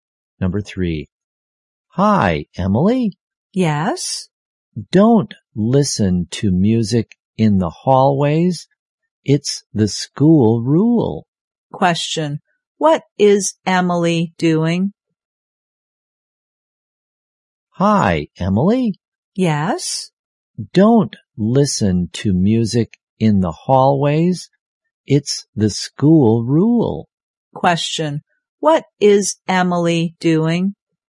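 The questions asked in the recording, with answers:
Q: What is Emily doing?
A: Listening to music in the hallways.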